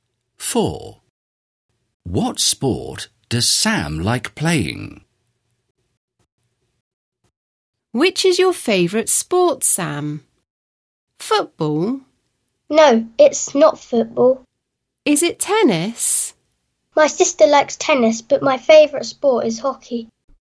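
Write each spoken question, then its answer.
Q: What sport does Sam like playing?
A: Hockey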